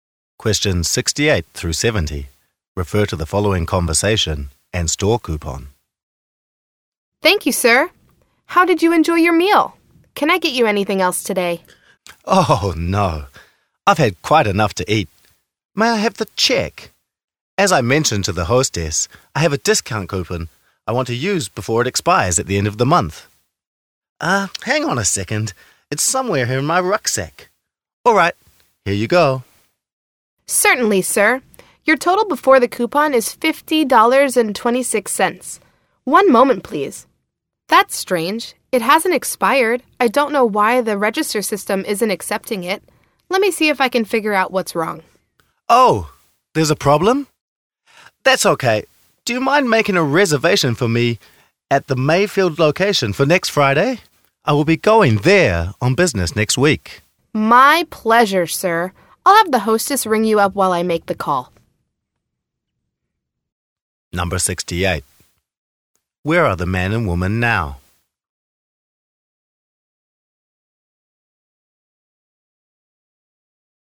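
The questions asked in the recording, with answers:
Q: Where are the man and woman now?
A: At a restaurant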